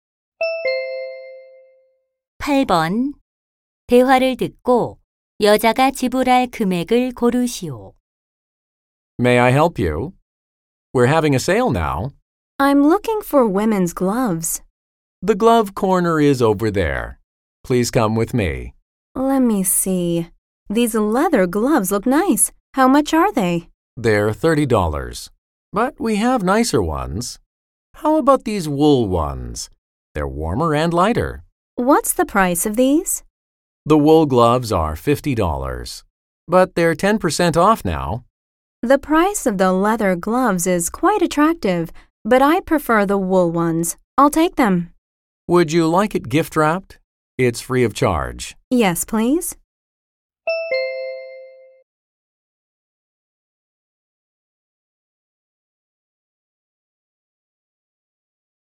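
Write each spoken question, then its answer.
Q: 대화를 듣고 여자가 지불할 금액을 고르시오.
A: 45달러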